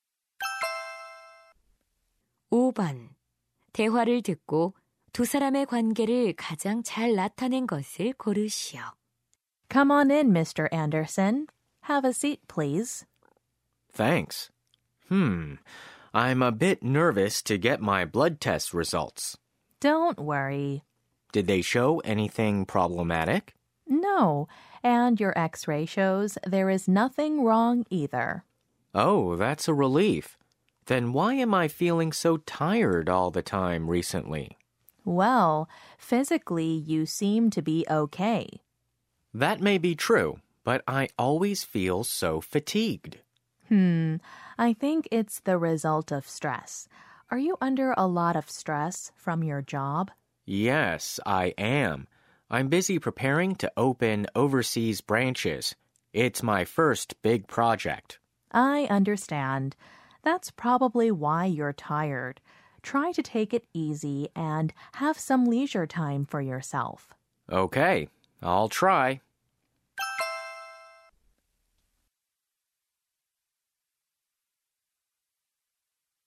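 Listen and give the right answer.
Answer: 의사 - 환자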